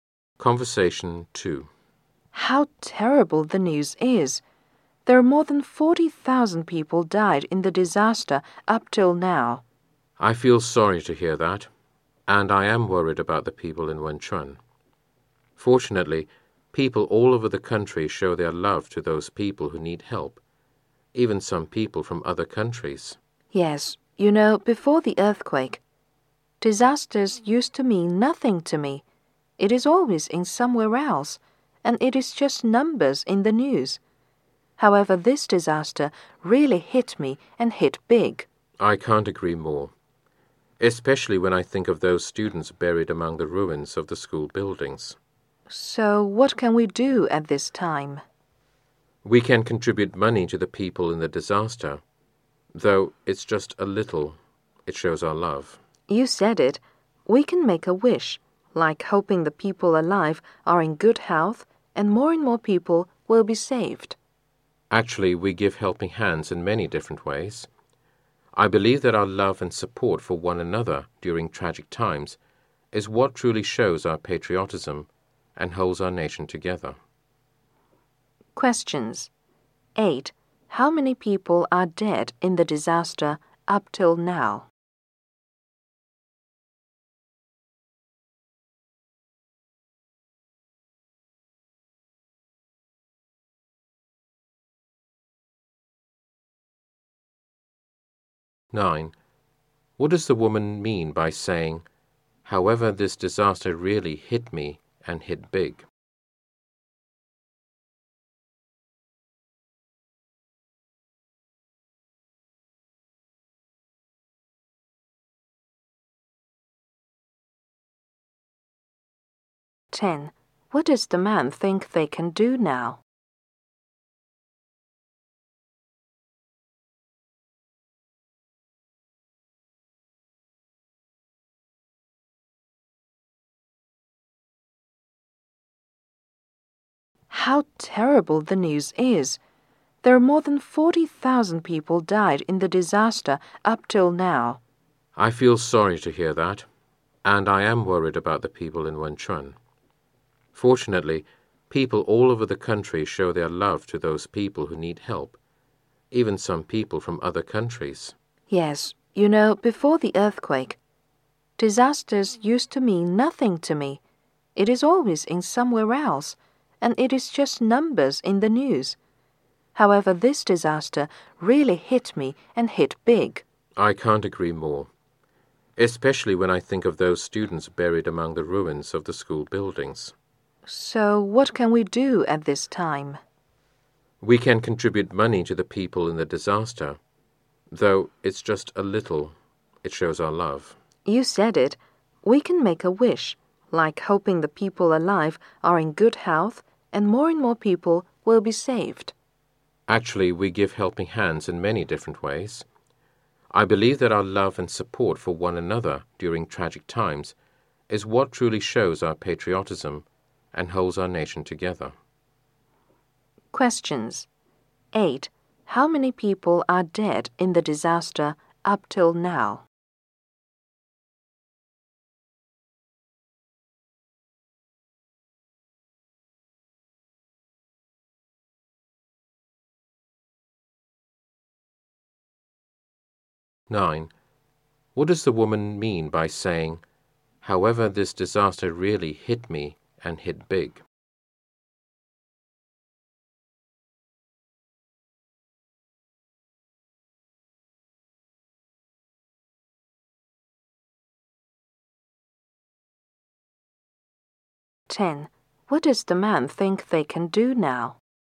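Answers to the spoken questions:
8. More than 40,000
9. The disaster affected her deeply, unlike earlier ones that meant nothing to her
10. Contribute money and make a wish for the people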